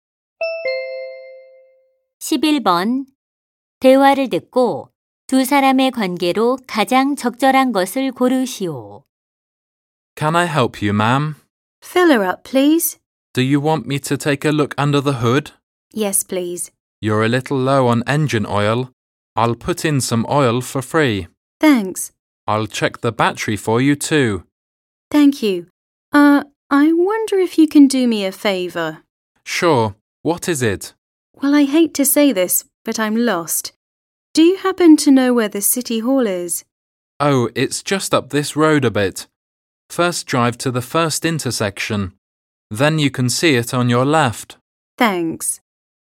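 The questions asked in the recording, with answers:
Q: 대화를 듣고 두 사람의 관계로 가장 적절한 것을 고르시오.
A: 주유소 직원 - 손님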